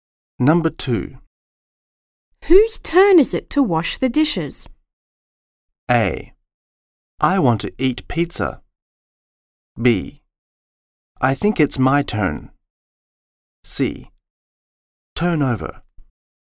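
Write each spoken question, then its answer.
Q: Whose turn is it to wash the dishes?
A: B: I think it's my turn.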